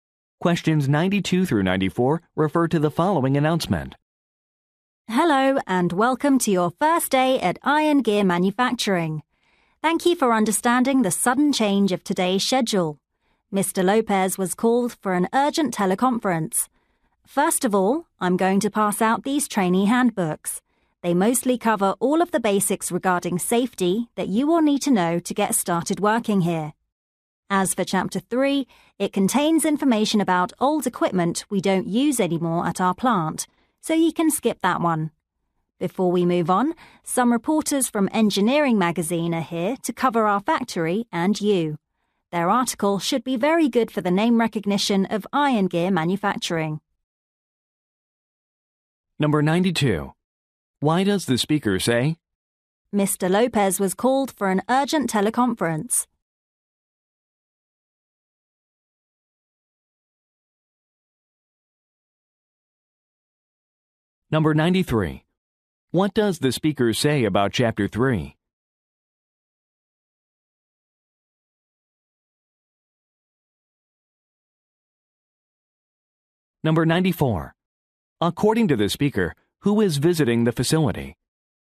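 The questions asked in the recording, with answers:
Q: Why does the speaker say?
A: To explain why the schedule changed

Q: What does the speaker say about Chapter 3?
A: It can be skipped

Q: According to the speaker, who is visiting the facility?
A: Reporters from Engineering Magazine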